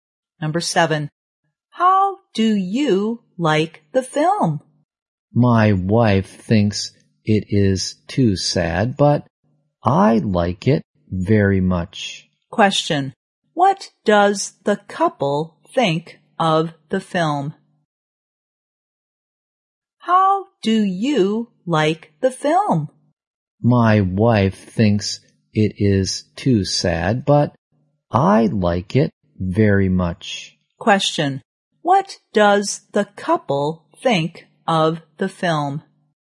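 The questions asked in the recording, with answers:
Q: What does the couple think of the film?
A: The wife thinks it is too sad, but the husband likes it very much.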